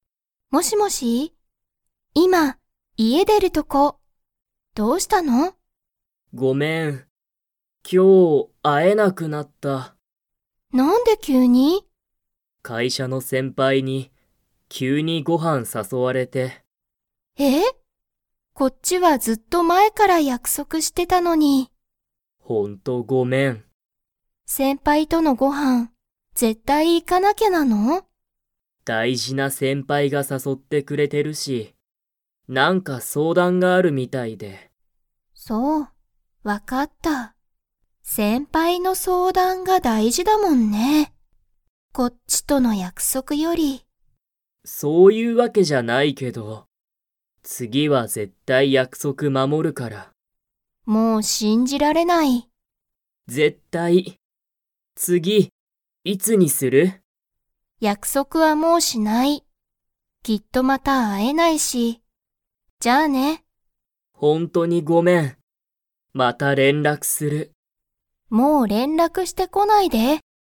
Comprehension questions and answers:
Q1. タケシは、誰だれにご飯はんに誘さそわれましたか?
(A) お父とうさん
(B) お母かあさん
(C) 彼女かのじょ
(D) 会社かいしゃの先輩せんぱい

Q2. リカは、タケシのことを 。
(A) 信しんじられる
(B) 信しんじられない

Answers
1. (D) 会社かいしゃの先輩せんぱい
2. (B) 信しんじられない

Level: Level 4

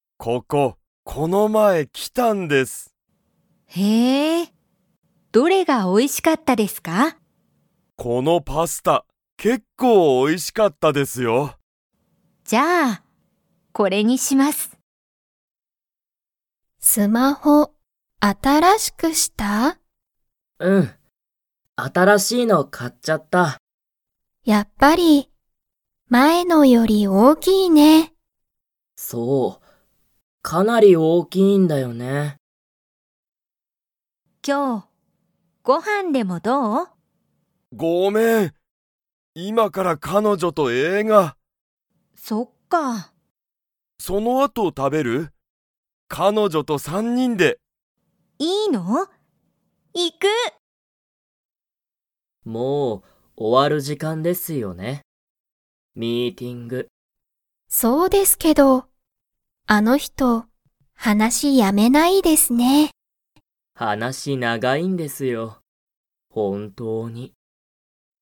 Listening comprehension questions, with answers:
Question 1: このパスタは、____美味おいしかった。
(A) 結構(けっこう)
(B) やはり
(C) もう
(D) 前(まえ)と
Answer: (A) 結構(けっこう)

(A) はい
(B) いいえ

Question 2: 前(まえ)のスマホは、新(あたら)しいスマホより大(おお)きかったですか?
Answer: (B) いいえ

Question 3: ユウコとケントは、今日(きょう)ご飯(はん)を一緒(いっしょ)に食(た)べますか?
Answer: (A) はい

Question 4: ____は、もう終(お)わる時間(じかん)だ。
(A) もう人(ひと)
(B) 本当(ほんとう)の話(はなし)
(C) あの仕事(しごと)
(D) ミーティング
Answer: (D) ミーティング

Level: Level 1

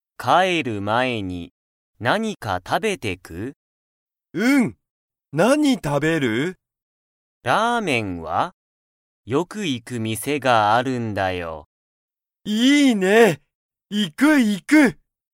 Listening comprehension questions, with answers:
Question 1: ユウスケとコウタは、____を食(た)べる。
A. ピザ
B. ラーメン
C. パン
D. パスタ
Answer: B. ラーメン

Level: Level 1

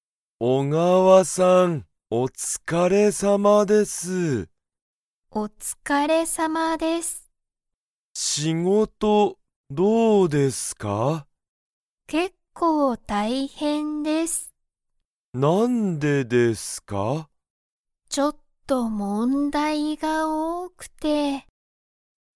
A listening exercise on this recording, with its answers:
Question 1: 小川(おがわ)さんの仕事(しごと)は、____。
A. すごく簡単かんたんだ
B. 少(すこ)しだけ大変(たいへん)だ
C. 全然問題(ぜんぜんもんだい)ない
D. 結構大変(けっこうたいへん)だ)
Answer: D. 結構大変(けっこうたいへん)だ)

